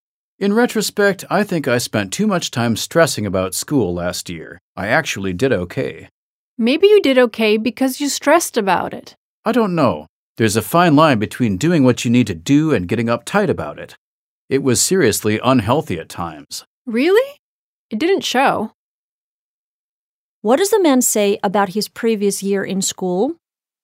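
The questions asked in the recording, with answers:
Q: What does the man say about his previous year in school?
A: He stressed too much about school, though he actually did okay.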